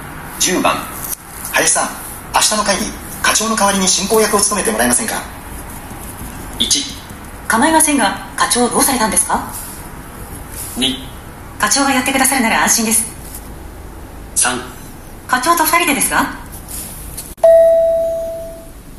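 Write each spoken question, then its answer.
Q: 林さん、明日の会議課長の代わりに進行役を務めてもらえませんか。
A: 1: 構いませんが課長どうされたんですか。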